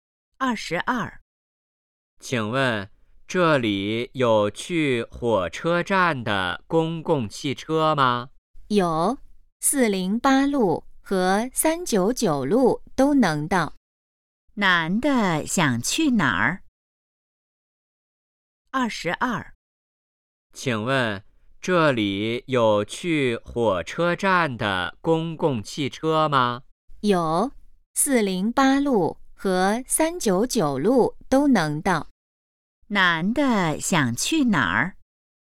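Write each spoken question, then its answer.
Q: 男的想去哪儿?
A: 火车站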